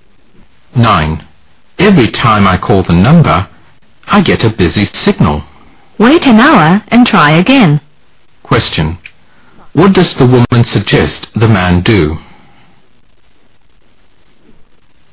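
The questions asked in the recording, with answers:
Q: What does the woman suggest the man do?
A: Wait an hour and call again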